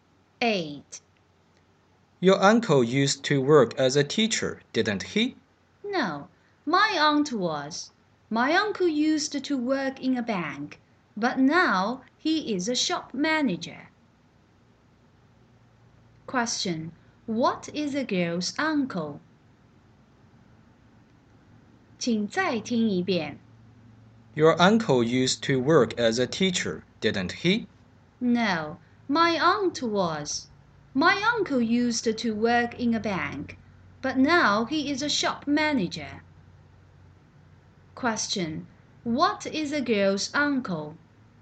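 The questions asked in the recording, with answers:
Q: Question: What is the girl's uncle?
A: A shop manager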